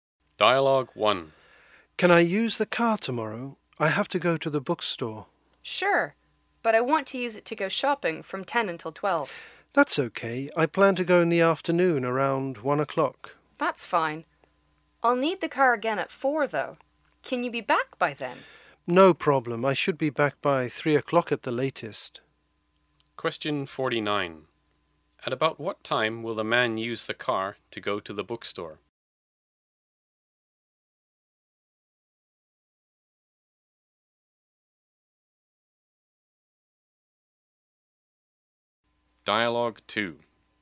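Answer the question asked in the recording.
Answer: Around 1 o'clock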